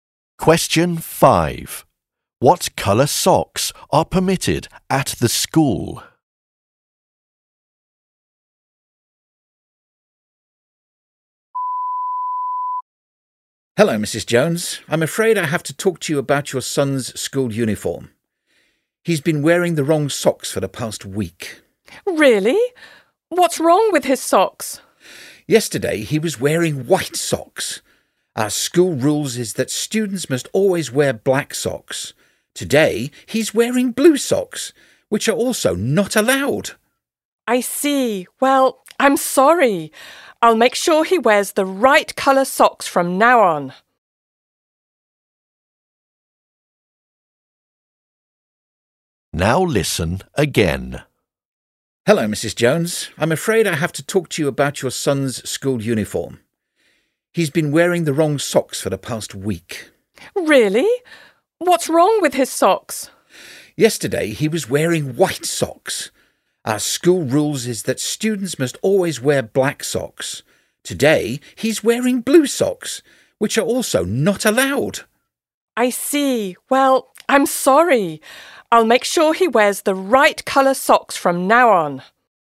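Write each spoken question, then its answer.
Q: What colour socks are permitted at the school?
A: Black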